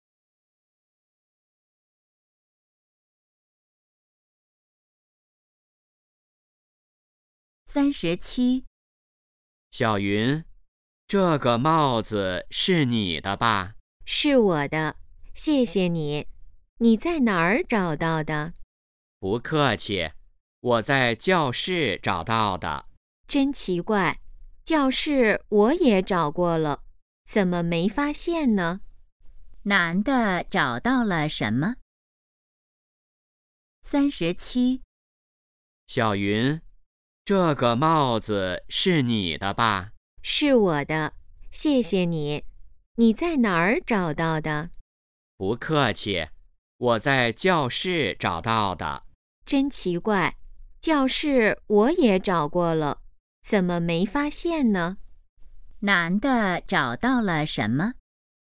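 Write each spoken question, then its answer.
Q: 男的找到了什么?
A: 帽子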